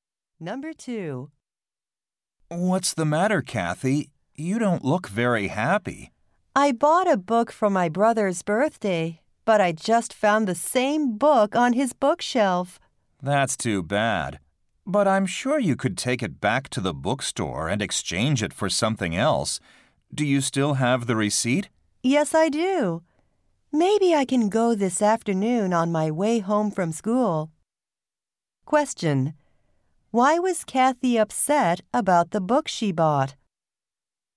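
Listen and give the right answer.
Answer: Her brother already has the same book.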